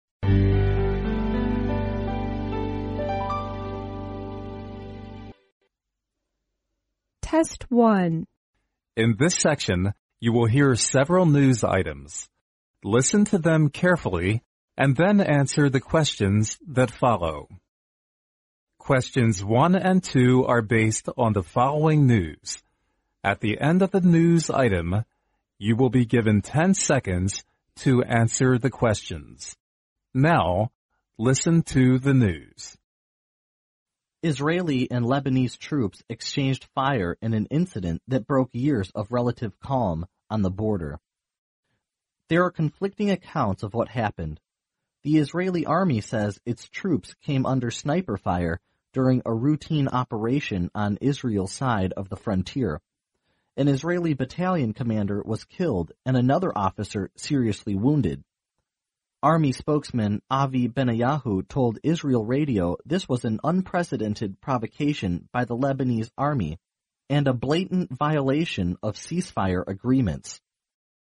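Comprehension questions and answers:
Now listen to the news.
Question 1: Israeli and Lebanese troops exchanged fire _____.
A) on Lebanese side of the frontier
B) under provocation by Israeli army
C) during an Israeli routine operation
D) during a Lebanese routine operation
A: C) during an Israeli routine operation

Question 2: The following are the results of Israeli and Lebanese troops exchanging fire EXCEPT_____.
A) violation of ceasefire agreements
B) a Lebanese commander's death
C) an Israeli commanders death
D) breaking years of relative calm on the border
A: B) a Lebanese commander's death

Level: 英语四级

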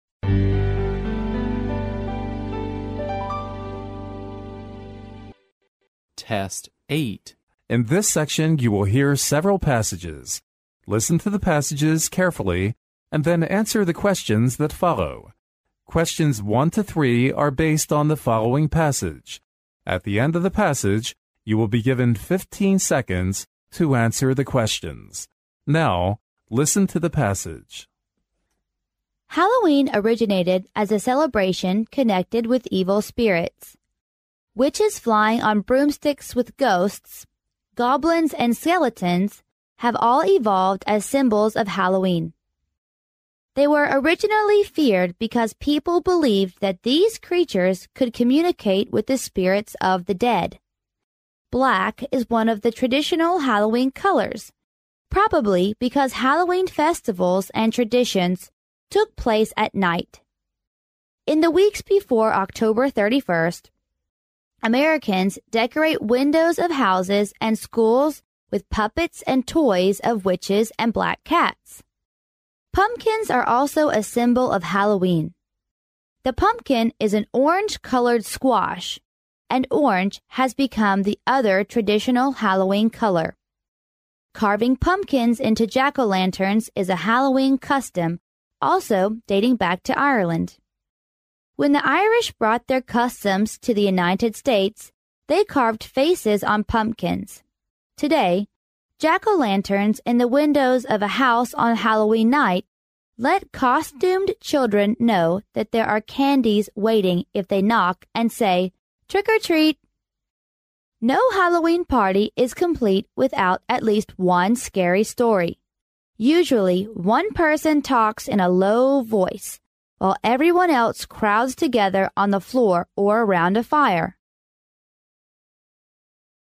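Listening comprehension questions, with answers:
Now, listen to the passage.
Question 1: Which of the following items is NOT the symbol of Halloween?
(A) Witch flying on broomsticks.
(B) Skeleton.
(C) Pumpkin.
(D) Turkey.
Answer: (D) Turkey.

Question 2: Today jack-o'-lanterns in the windows of a house on Halloween night let costumed children that_____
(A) they can buy pumpkin pies there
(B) the hosts wouldn't like to be bothered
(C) knocking and saying "Trick or Treat!" will make the host give candies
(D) there is nobody in the house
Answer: (C) knocking and saying "Trick or Treat!" will make the host give candies

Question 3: What's the necessary part of a Halloween party?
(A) Scary stories.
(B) Fairy tales.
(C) Jokes.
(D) Lectures.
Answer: (A) Scary stories.

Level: 专业四级

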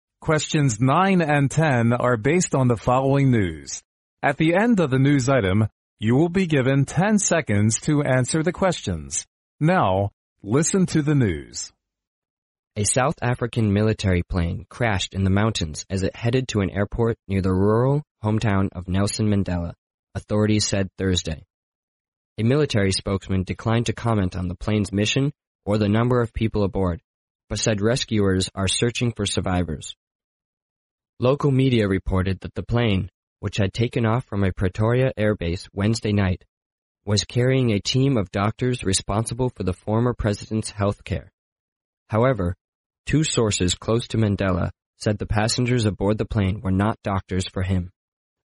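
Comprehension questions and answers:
Now listen to the news.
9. According to the news item,what was disclosed about the plane crash?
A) The duty of the plane.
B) The number of passengers.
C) The death toll.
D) When and where the plane took off.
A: D) When and where the plane took off.

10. According to the news item,which of the following is CORRECT?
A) The military plane crashed in the hometown of Nelson Mandela.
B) All the survivors had already been found.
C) The passengers aboard were doctors for Mandela.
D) The identity of the passengers was not sure so far.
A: D) The identity of the passengers was not sure so far.

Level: 专业四级

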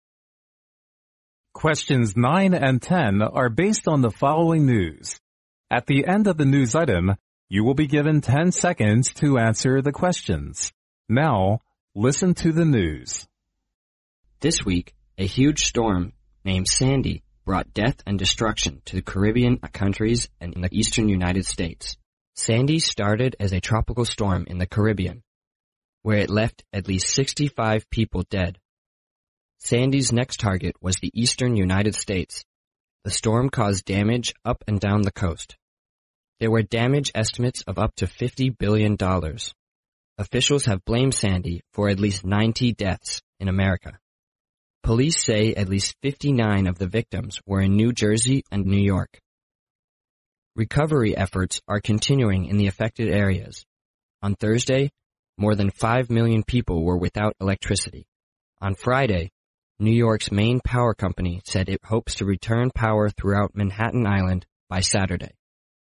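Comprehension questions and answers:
Now listen to the news.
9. How many deaths had Sandy caused in the Caribbean?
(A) 50.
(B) 90.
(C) 59,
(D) 65.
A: (D) 65.

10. According to the news item, which of the following is CORRECT?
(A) Sandy hit the eastern states of America first.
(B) Sandy has claimed fifty-nine lives in New Jersey alone.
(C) Four million people in America were living without electricity.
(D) Residents in Manhattan Island may return to normal use of power on Saturday.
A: (D) Residents in Manhattan Island may return to normal use of power on Saturday.

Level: 专业四级

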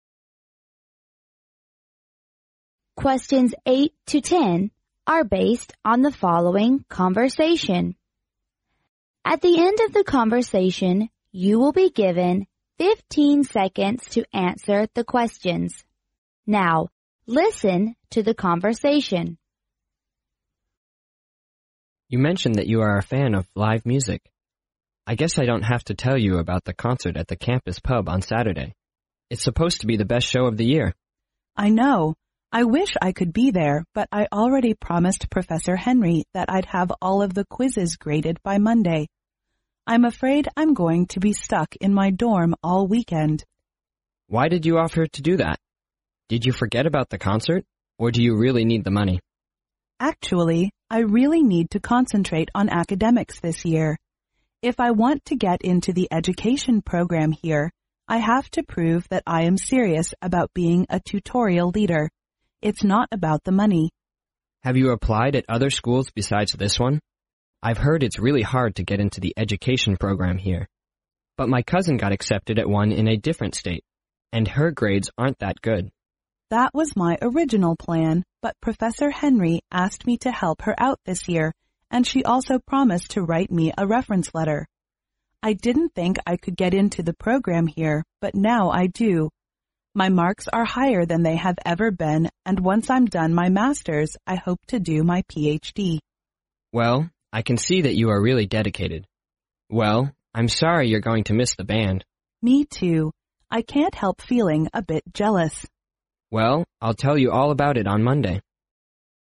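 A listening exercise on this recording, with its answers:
In this section you hear several conversations. Listen to the conversations carefully and then answer the questions that follow.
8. Where will the woman spend her weekend?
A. At the campus pub.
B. In the classroom.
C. In the dormitory.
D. In Professor's office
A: C. In the dormitory.

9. According to the conversation,which of the following statements is INCORRECT?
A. The woman's original plan is to apply in other states' school.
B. The main's relative is studying education program at the woman's school.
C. The woman has made tremendous progress in her academics compared with the past.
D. Both the man and the woman feel sorry for her missing the live concert.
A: B. The main's relative is studying education program at the woman's school.

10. The fact that the woman endeavors to work for her professor is to_____.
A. earn money to cover her daily expense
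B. further her study to do a PhD at a different school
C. complete her Master's degree sooner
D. get her professor's recommendation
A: D. get her professor's recommendation

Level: 英语四级

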